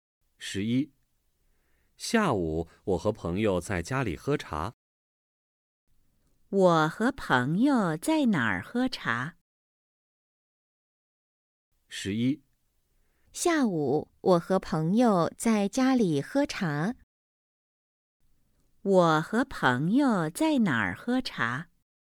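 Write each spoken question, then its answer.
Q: 我和朋友在哪儿喝茶?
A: 在家里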